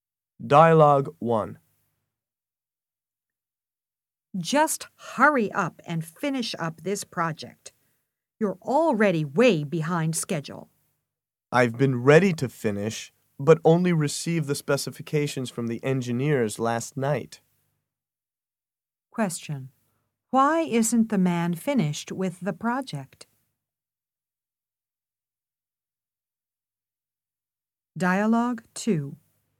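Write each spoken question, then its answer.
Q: Why isn't the man finished with the project?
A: He only received the specifications from the engineers last night.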